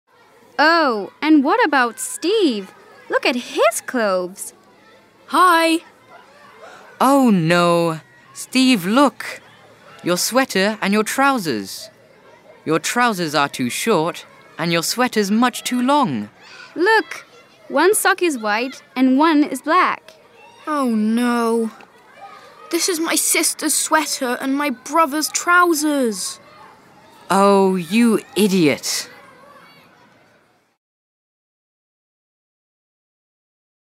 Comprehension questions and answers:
4 – Listen again, copy and complete the information.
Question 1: His .................. are black and white.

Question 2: His .................. are too short.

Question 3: His .................. is too long.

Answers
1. socks
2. trousers
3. sweater